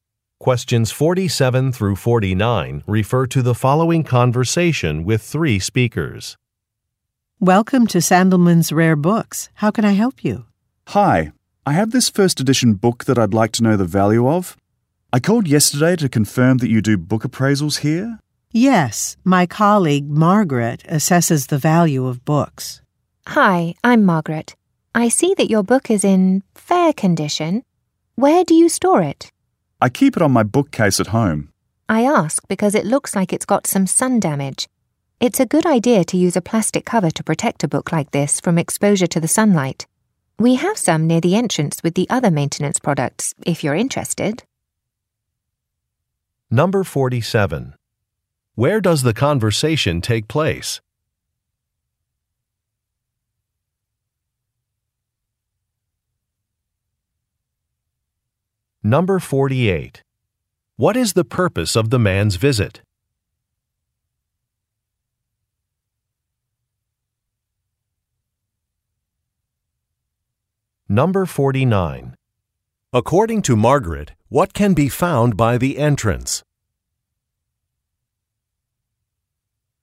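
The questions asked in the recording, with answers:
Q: Where does the conversation take place?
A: At a rare bookstore

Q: What is the purpose of the man's visit?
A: To get a book appraised

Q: According to Margaret, what can be found by the entrance?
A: Plastic book covers (maintenance products)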